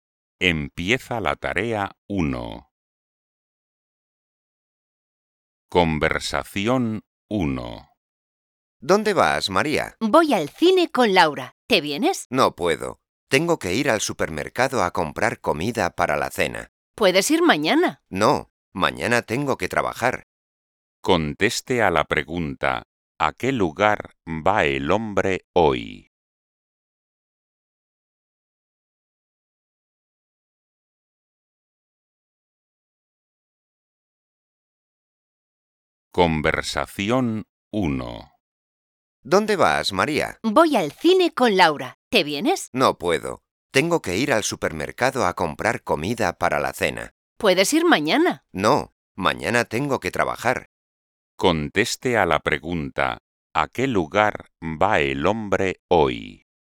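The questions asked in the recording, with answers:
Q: ¿a qué lugar va el hombre hoy?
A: Al supermercado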